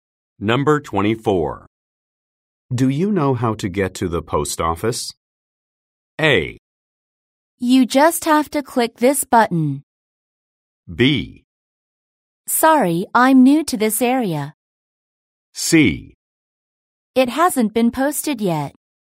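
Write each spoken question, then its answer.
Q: Do you know how to get to the post office?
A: B: Sorry, I'm new to this area.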